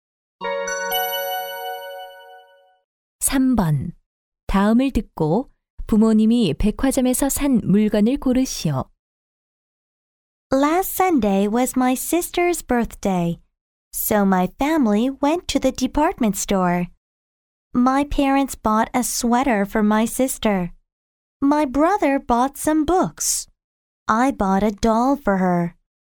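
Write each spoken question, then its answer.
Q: 다음을 듣고 부모님이 백화점에서 산 물건을 고르시오.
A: 스웨터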